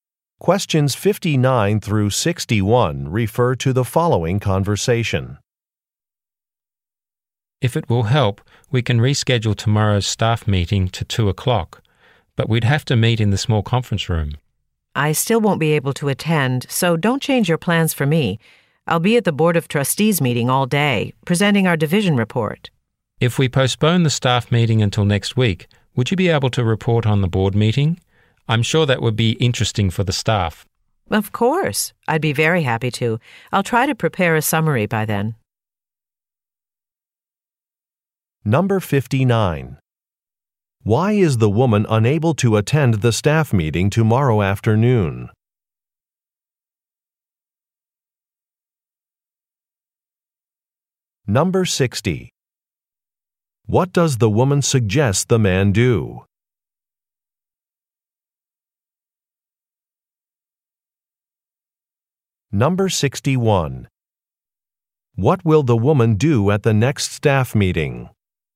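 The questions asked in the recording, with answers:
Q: Why is the woman unable to attend the staff meeting tomorrow afternoon?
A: She will be at the Board of Trustees meeting all day presenting the division report

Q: What will the woman do at the next staff meeting?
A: Report on the board meeting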